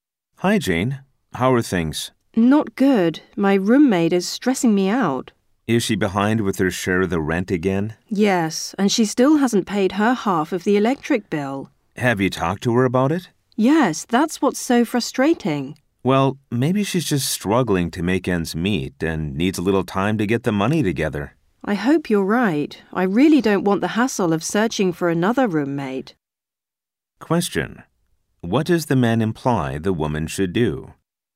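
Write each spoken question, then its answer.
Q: What does the man imply the woman should do?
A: Be patient and give her roommate more time to get the money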